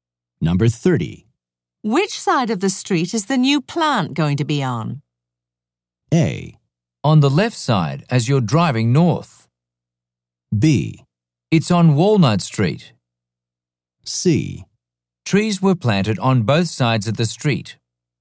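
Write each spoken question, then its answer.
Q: Which side of the street is the new plant going to be on?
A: A: On the left side as you're driving north.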